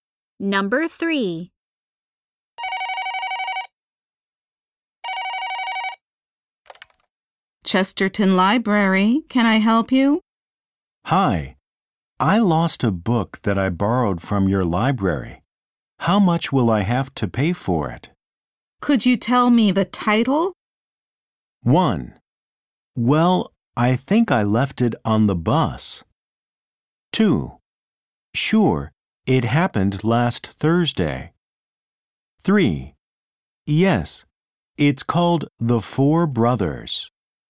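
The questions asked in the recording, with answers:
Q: Could you tell me the title?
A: 3: Yes, it's called The Four Brothers.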